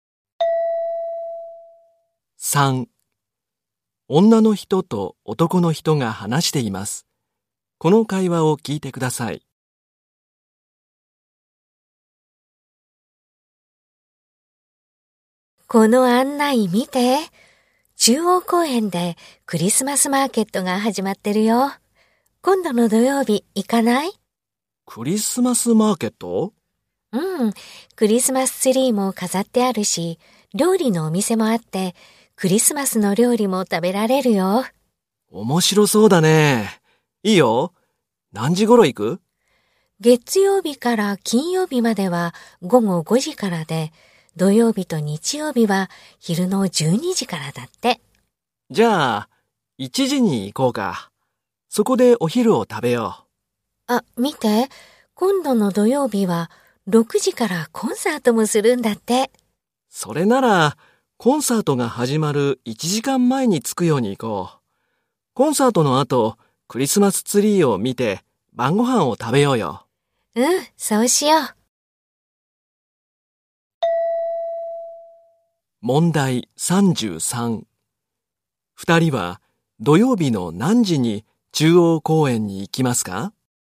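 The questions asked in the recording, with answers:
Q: 二人は土曜日の何時に中央公園に行きますか?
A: 5時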